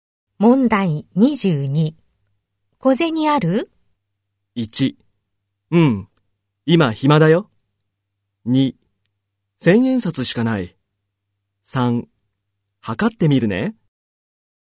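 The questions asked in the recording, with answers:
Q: 小銭ある?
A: 2: 千円札しかない。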